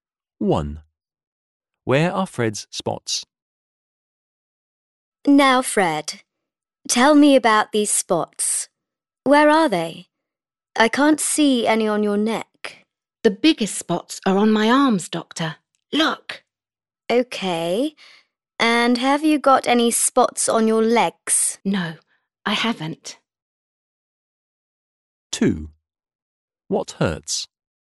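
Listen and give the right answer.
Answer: On his arms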